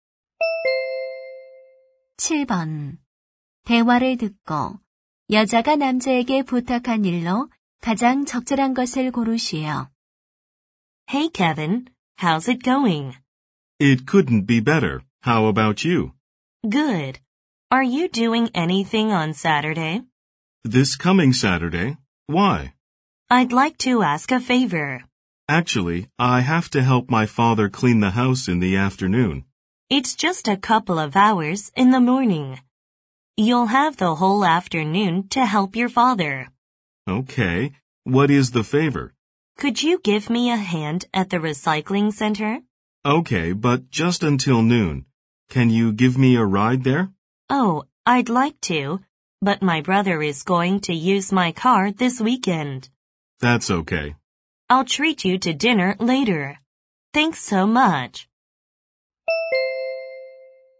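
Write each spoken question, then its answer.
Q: 대화를 듣고 여자가 남자에게 부탁한 일로 가장 적절한 것을 고르시오.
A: 재활용 센터 일 돕기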